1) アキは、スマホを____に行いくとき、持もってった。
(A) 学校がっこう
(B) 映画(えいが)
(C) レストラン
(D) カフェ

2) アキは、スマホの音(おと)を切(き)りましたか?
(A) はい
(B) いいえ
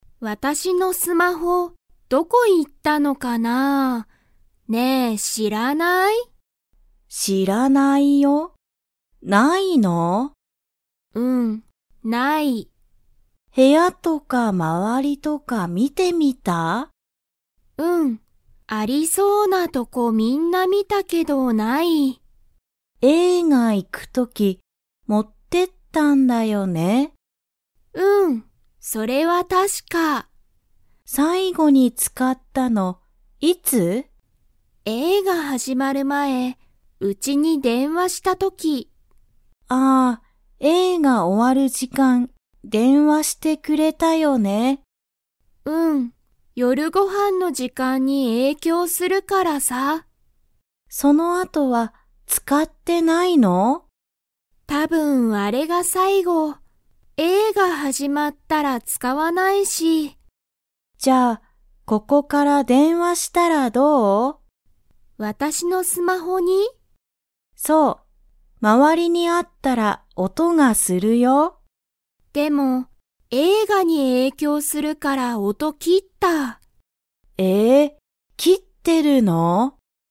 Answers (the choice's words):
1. 映画(えいが)
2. はい